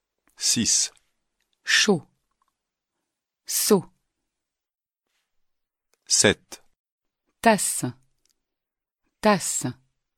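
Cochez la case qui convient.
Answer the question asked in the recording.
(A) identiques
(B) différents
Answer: (B) différents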